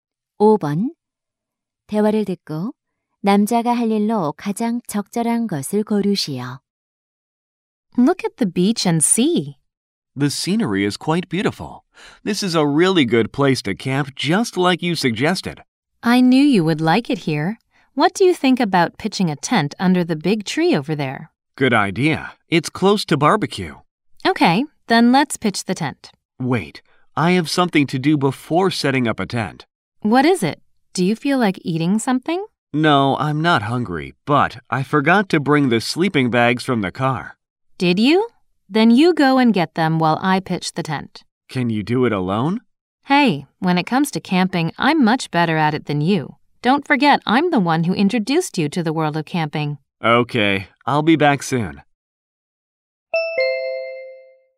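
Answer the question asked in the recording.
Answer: 차에서 침낭 가져오기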